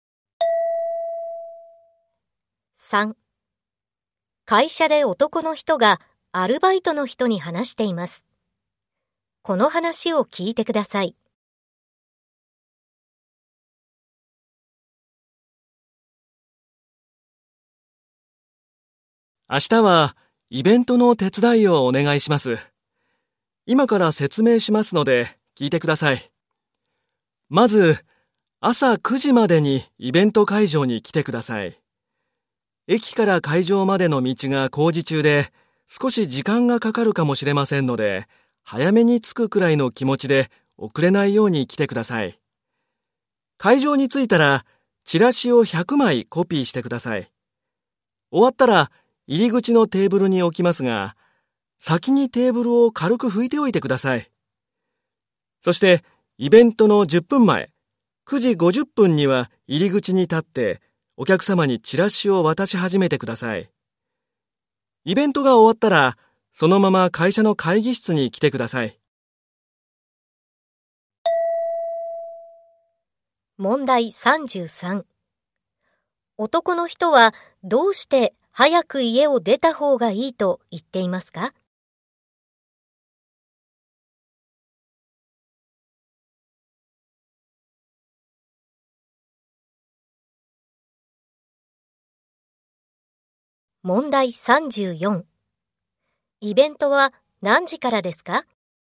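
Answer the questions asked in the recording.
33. 駅から会場までの道が工事中で時間がかかるかもしれないから
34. 10時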